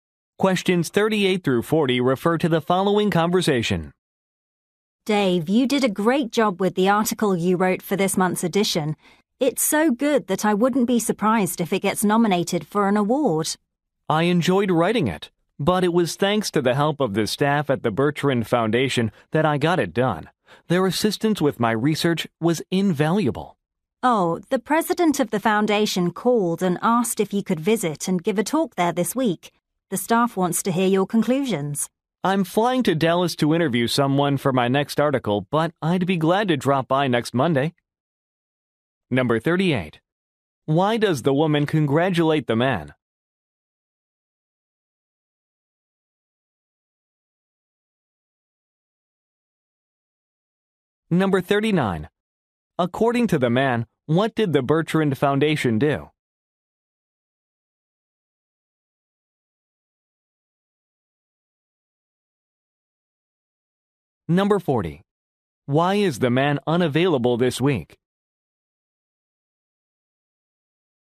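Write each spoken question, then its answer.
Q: Why does the woman congratulate the man?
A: He wrote a great article

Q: According to the man, what did the Bertrand Foundation do?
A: Helped with his research

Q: Why is the man unavailable this week?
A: He is flying to Dallas for an interview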